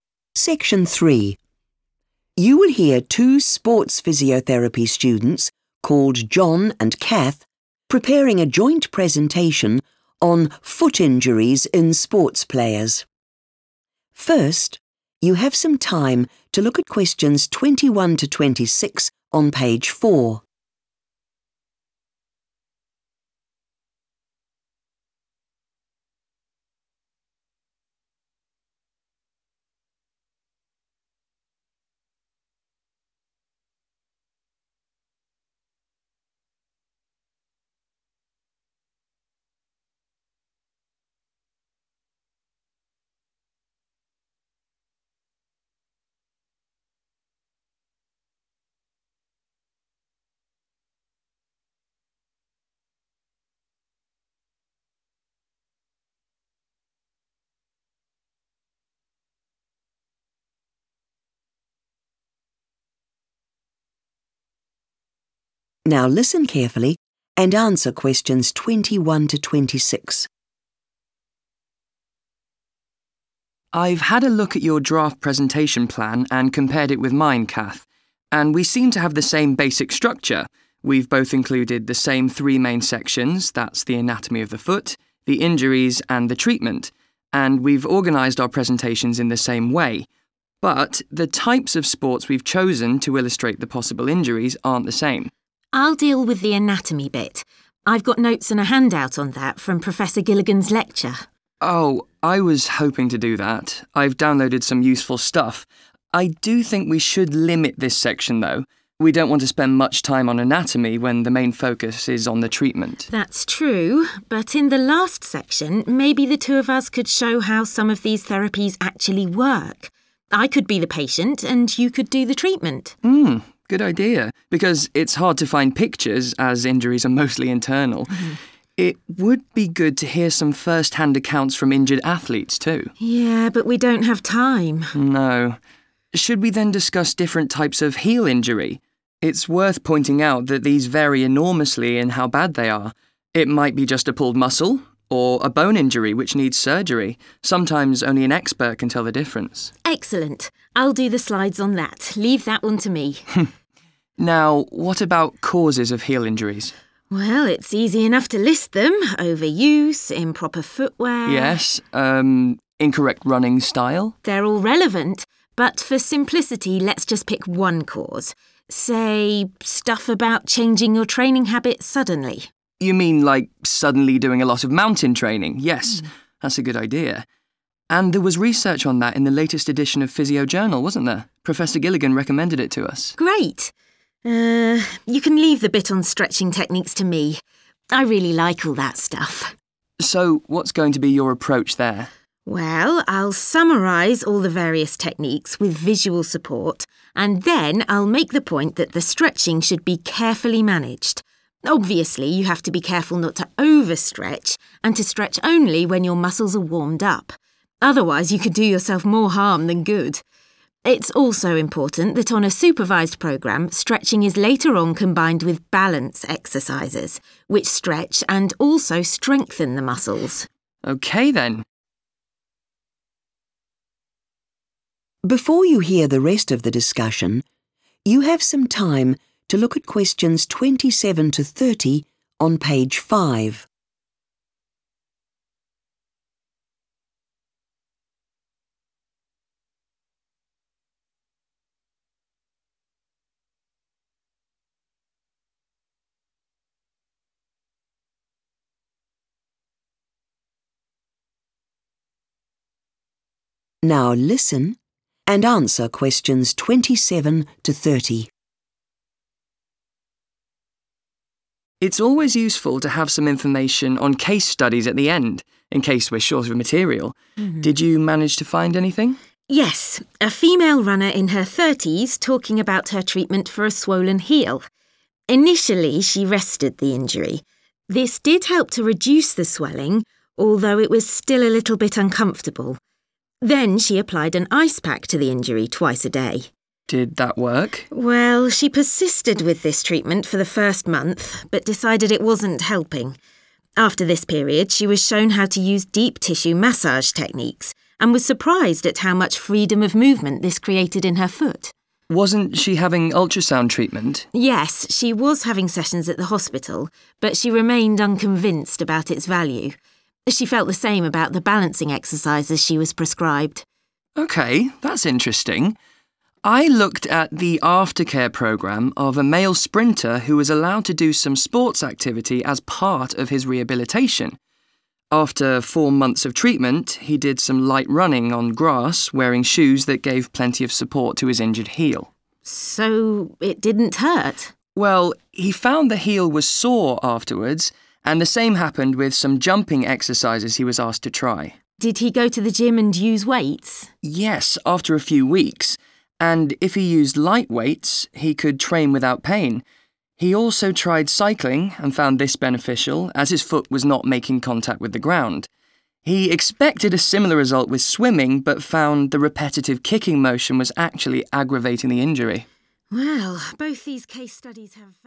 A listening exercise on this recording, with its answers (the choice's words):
Choose the correct letter, A, B or C.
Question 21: John and Cath's presentation plans are different in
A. the examples used.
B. the order of information.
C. the main points made.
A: the examples used.

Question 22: What do the students agree about the anatomy section of their presentation?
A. It would be better if Cath spoke about it.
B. It should be kept quite short.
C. It should be based on information from the internet.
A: It should be kept quite short.

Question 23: What do the students agree to include in the last section?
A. visuals of injuries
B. demonstrations of treatment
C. interviews with patients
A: demonstrations of treatment

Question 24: What is said about the different types of heel injury?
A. Diagnosis is straightforward.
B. They are expensive to treat.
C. Some are more serious than others.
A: Some are more serious than others.

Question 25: On the subject of causes of heel injuries, the students agree to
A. focus on a single reason.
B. reject certain approaches.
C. use a source written by their professor.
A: focus on a single reason.

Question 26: What does Cath say about stretching as a treatment?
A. It is potentially risky.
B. It is commonly confused with strengthening,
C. It is the least effective part of treatment.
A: It is potentially risky.